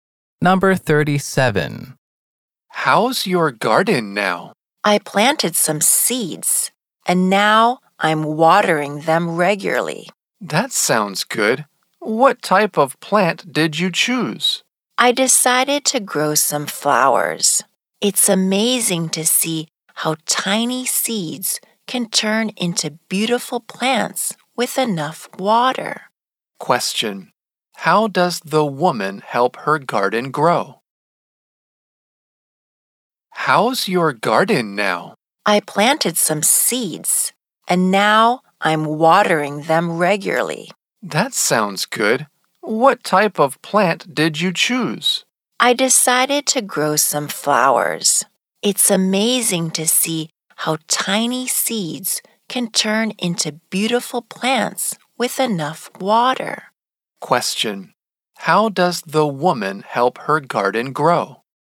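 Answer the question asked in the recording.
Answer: She waters the seeds regularly.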